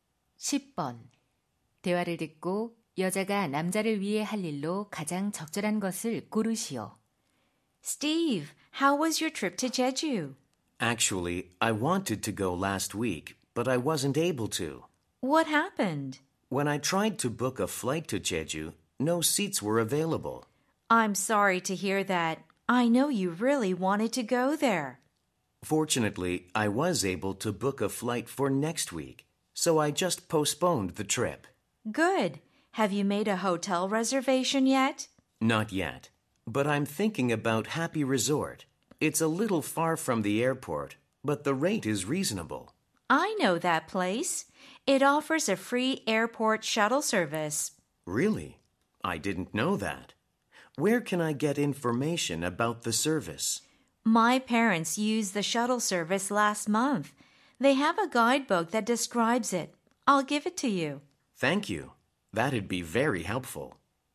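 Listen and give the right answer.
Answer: 셔틀 서비스 안내 책자 가져다주기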